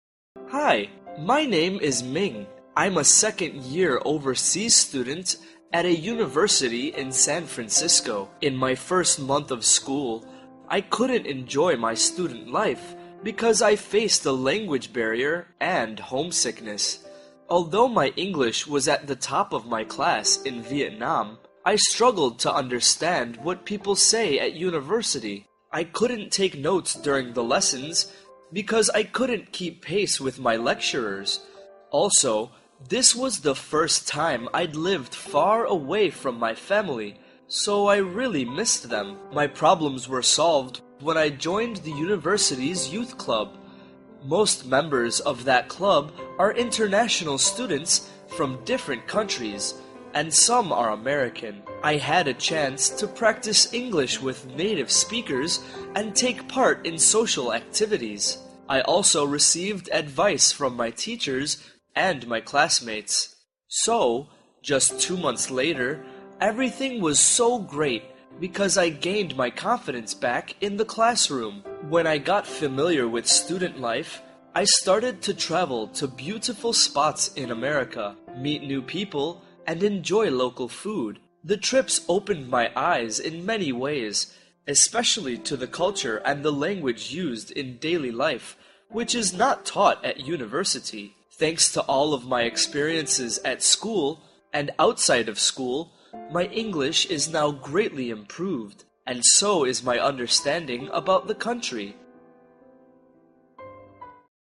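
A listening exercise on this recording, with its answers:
Task: Decide if each sentence is True (T) or False (F).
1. Minh studied abroad in the UK.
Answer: False

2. He had problems understanding lectures at first.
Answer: True

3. Joining the youth club helped him improve his English.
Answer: True

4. He learned about daily language use from traveling.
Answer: True

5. Minh still feels homesick after two months.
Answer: False

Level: lớp 8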